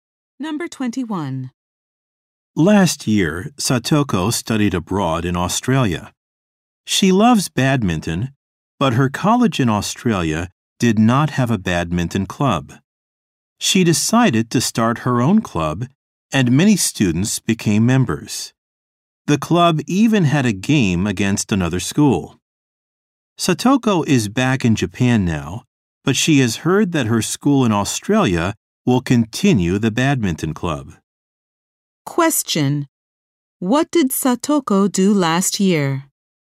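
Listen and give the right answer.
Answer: Started a badminton club at her college in Australia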